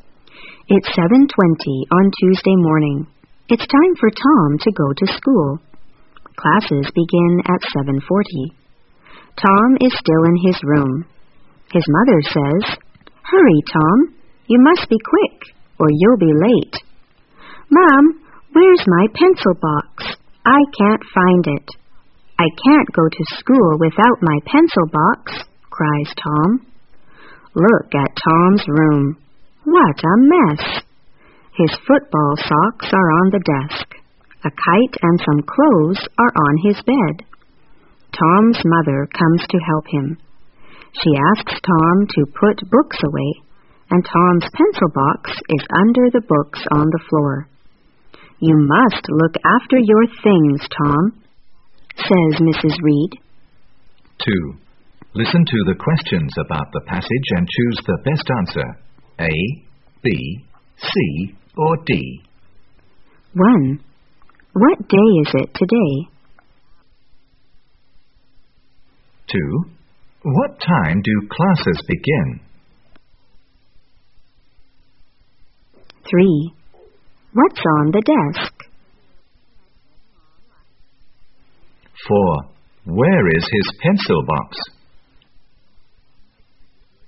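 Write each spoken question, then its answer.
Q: What day is it today?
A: Tuesday

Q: What time do classes begin?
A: At 7:40

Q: What's on the desk?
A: His football socks

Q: Where is his pencil box?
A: Under the books on the floor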